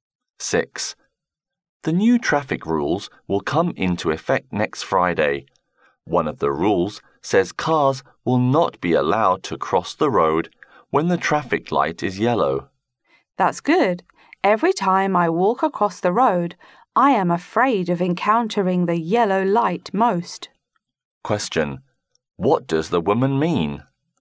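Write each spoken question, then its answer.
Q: What does the woman mean?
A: She welcomes the new rule, because she fears yellow lights when crossing the road.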